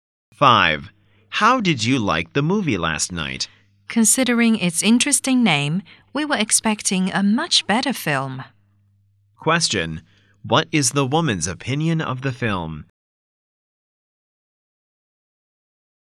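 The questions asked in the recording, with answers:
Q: Question, what is the woman's opinion of the film?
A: It was disappointing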